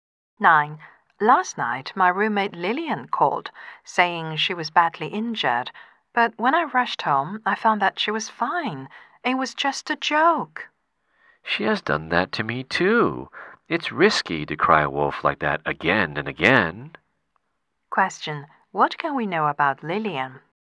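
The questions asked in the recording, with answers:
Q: What can we know about Lillian?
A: She often plays jokes by crying wolf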